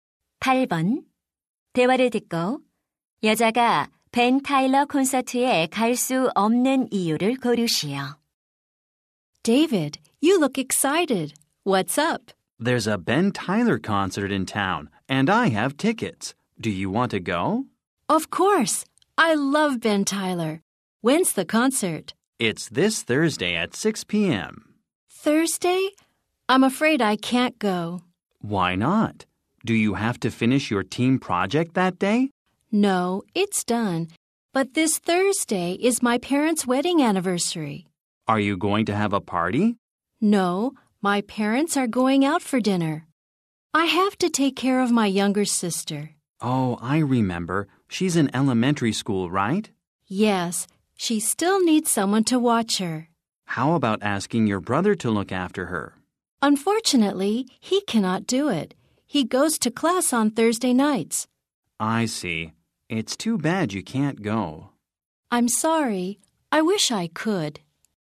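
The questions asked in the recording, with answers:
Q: 대화를 듣고 여자가 벤 타일러 콘서트에 갈 수 없는 이유를 고르시오.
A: 여동생을 돌봐야 해서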